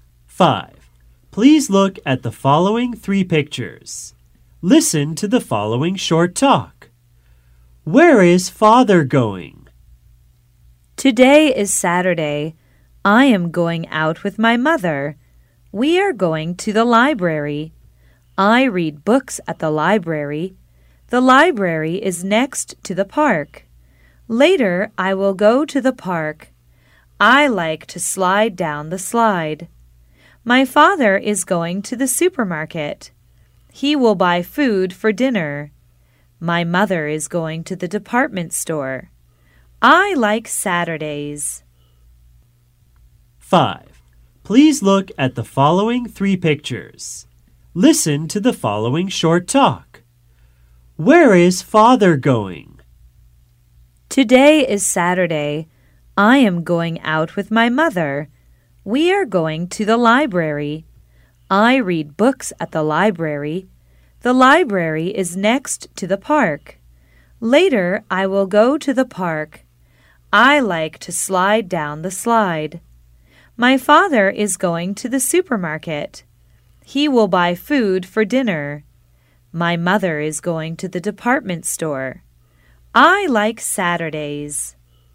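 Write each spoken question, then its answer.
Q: Where is Father going?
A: To the supermarket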